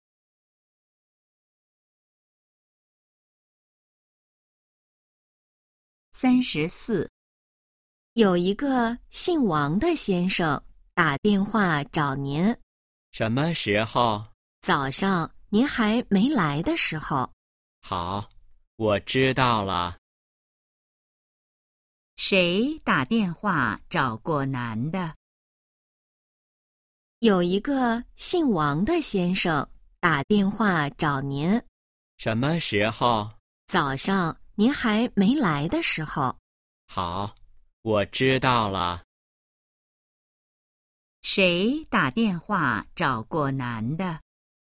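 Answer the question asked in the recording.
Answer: 一个姓王的先生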